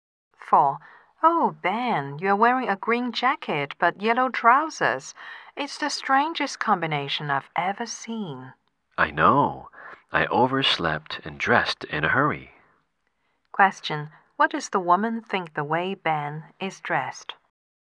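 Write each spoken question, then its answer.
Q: What does the woman think the way Ben is dressed?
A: It is a very strange combination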